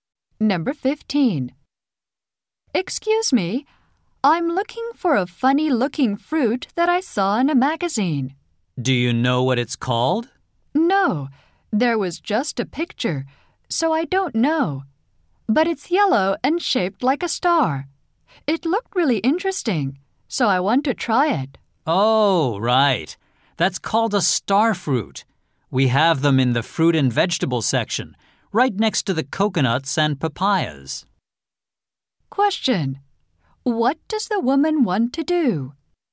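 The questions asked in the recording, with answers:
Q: What does the woman want to do?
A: Try a star fruit.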